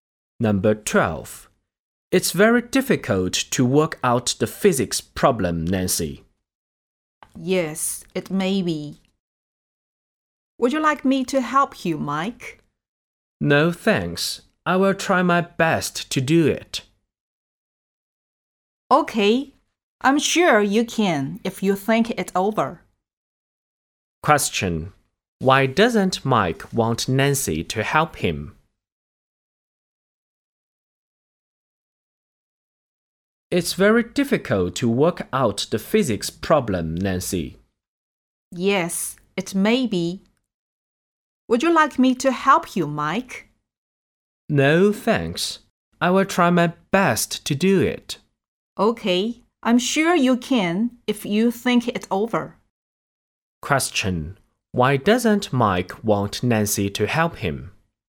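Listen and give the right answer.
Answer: He wants to try his best to work it out by himself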